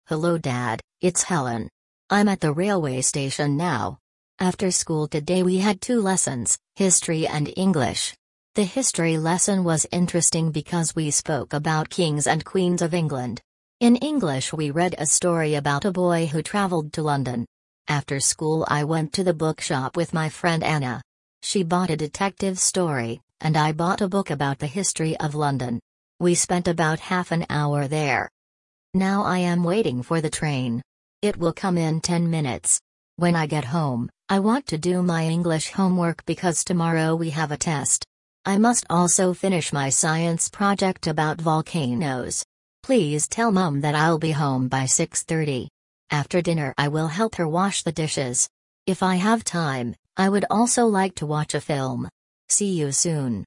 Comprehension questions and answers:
Прослушайте текст и определите, какие из приведённых утверждений A–E соответствуют содержанию текста (1 – Right), какие не соответствуют (2 – False).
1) Helen had History and English lessons today.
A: Right

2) In English they read a story about New York.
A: False

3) Helen bought a book about the history of London.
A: Right

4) She must finish a Science project about volcanoes.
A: Right

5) Helen will be home before 7 o'clock.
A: Right

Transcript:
Hello Dad, it's Helen. I'm at the railway station now. After school today we had two lessons — History and English. The History lesson was interesting because we spoke about kings and queens of England. In English we read a story about a boy who travelled to London. After school I went to the bookshop with my friend Anna. She bought a detective story, and I bought a book about the history of London. We spent about half an hour there.
Now I am waiting for the train. It will come in ten minutes. When I get home, I want to do my English homework because tomorrow we have a test. I must also finish my Science project about volcanoes. Please tell Mum that I'll be home by 6:30. After dinner I will help her wash the dishes. If I have time, I would also like to watch a film. See you soon!

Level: 6kl